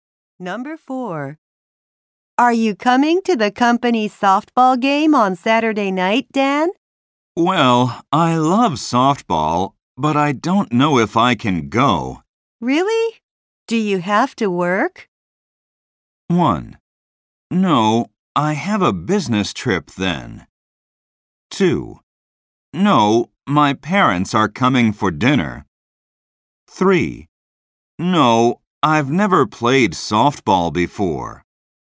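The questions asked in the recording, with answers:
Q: Really? Do you have to work?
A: 2: No, my parents are coming for dinner.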